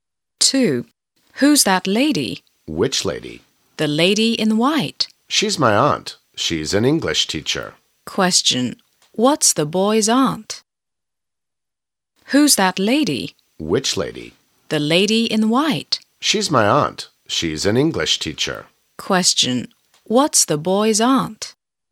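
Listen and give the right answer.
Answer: An English teacher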